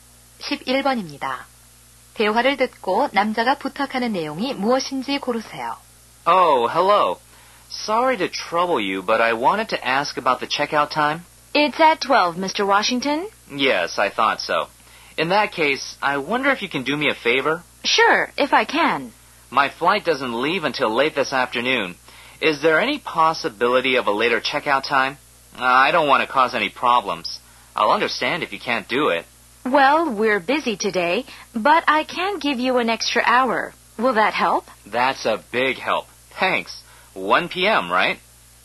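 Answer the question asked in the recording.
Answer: 호텔 체크아웃 시간을 늦춰 달라는 것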